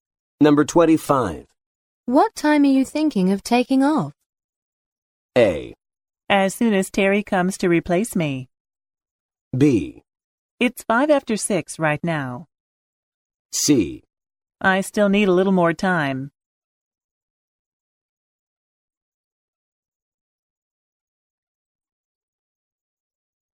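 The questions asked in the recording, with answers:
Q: What time are you thinking of taking off?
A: A: As soon as Terry comes to replace me.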